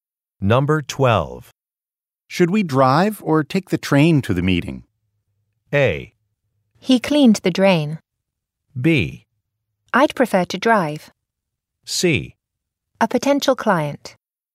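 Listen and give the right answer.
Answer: B: I'd prefer to drive.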